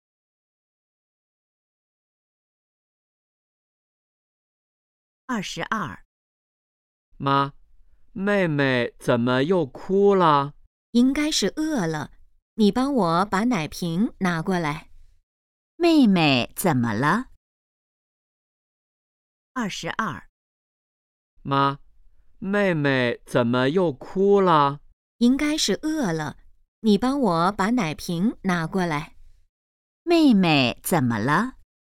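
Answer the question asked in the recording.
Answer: 饿了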